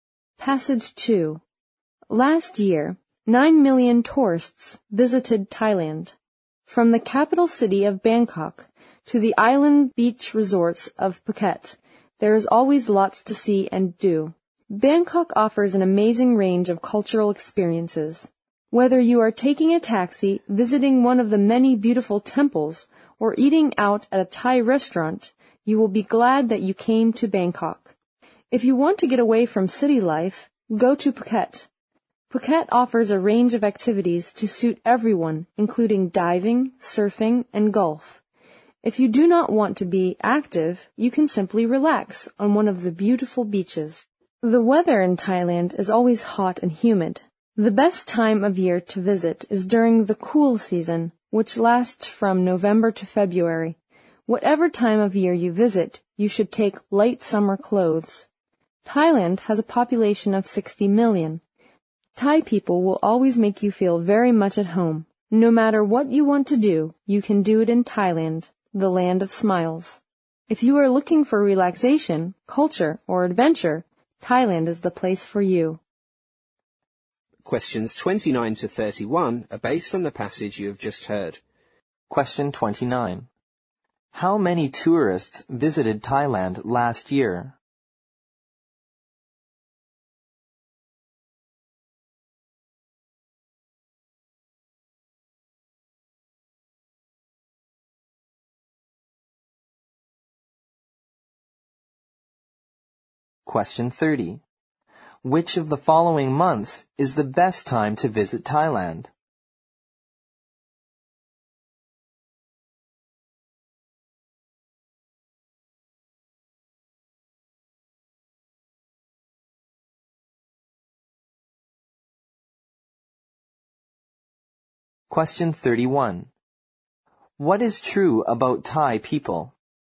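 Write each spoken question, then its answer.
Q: How many tourists visited Thailand last year?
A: 9 million

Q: Which of the following months is the best time to visit Thailand?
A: During the cool season, November to February

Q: What is true about Thai people?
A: They always make visitors feel at home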